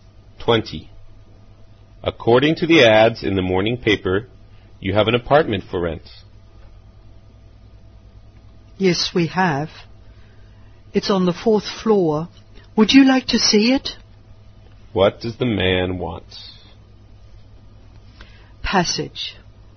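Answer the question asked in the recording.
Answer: To rent the apartment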